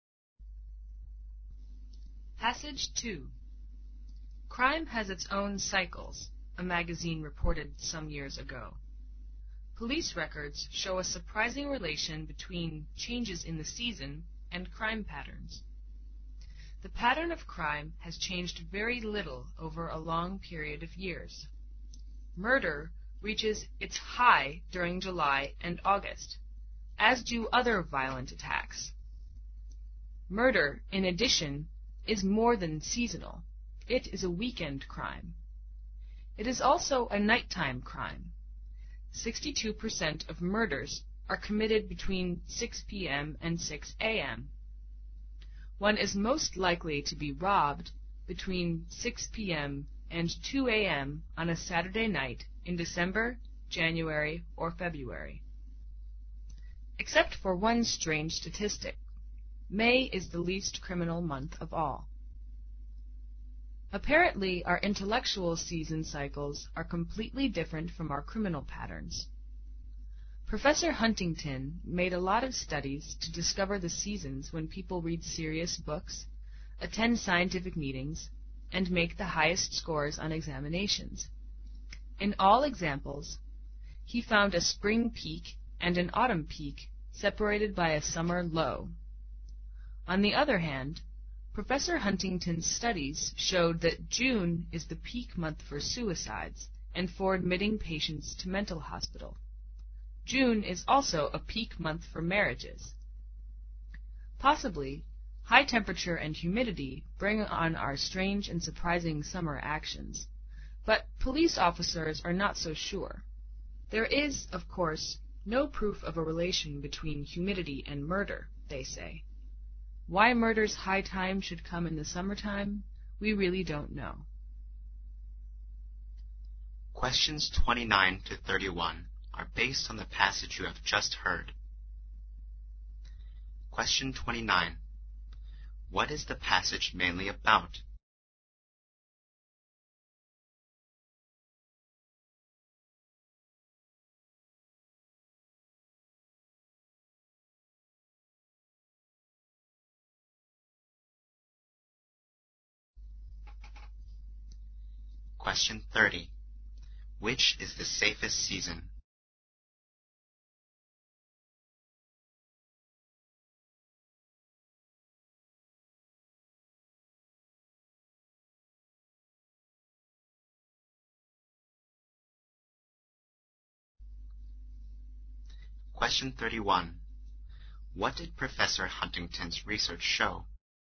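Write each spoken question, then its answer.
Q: Which is the safest season?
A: Spring (May is the least criminal month)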